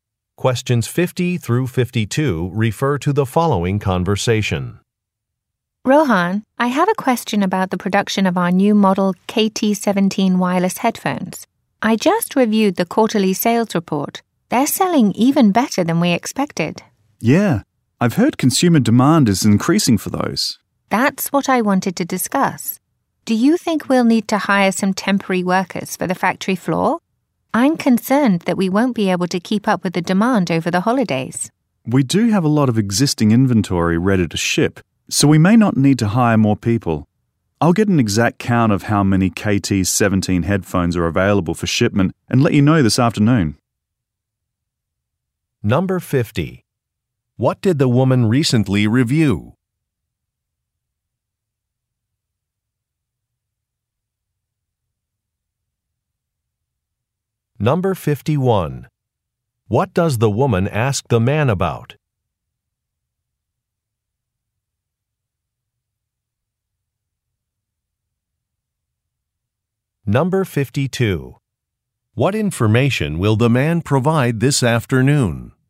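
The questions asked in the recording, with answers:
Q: What did the woman recently review?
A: A quarterly sales report

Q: What does the woman ask the man about?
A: Hiring temporary factory workers

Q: What information will the man provide this afternoon?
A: How many KT17 headphones are available for shipment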